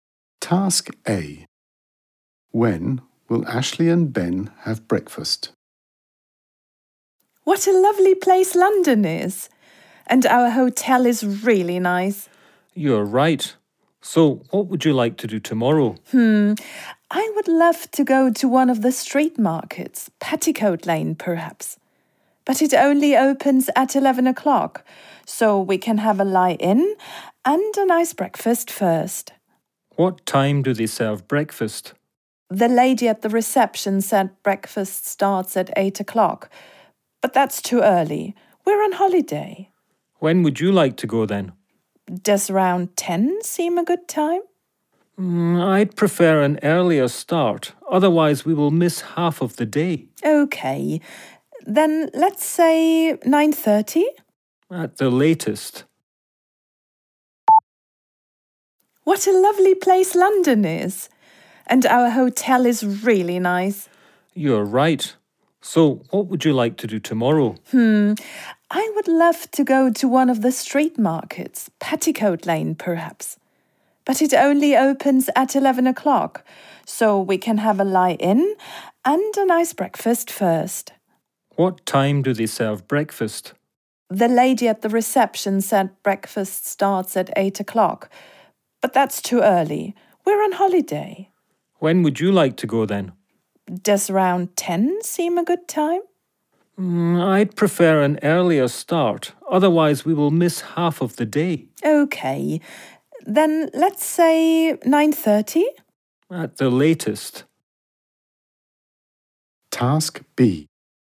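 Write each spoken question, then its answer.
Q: When will Ashley and Ben have breakfast?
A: At 9:30 at the latest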